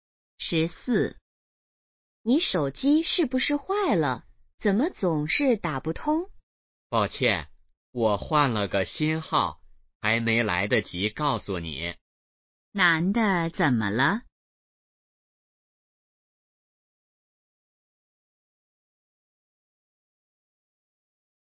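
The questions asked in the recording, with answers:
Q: 男的怎么了?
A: 换了新手机号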